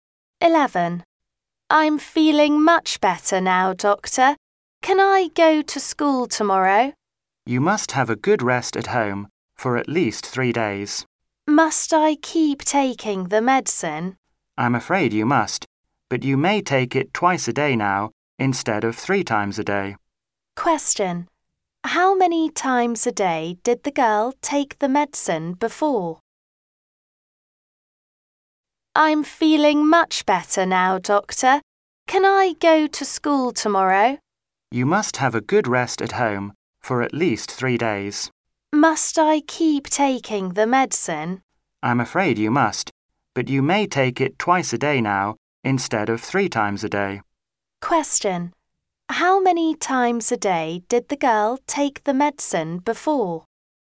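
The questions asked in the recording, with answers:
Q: How many times a day did the girl take the medicine before?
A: Three times a day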